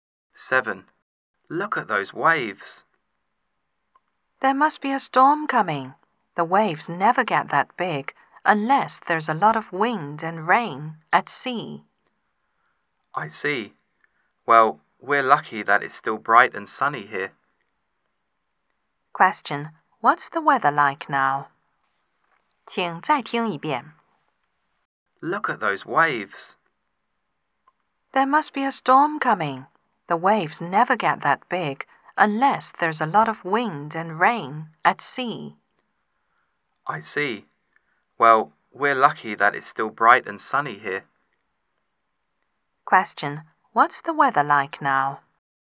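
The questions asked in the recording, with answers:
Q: Question, what's the weather like now?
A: Bright and sunny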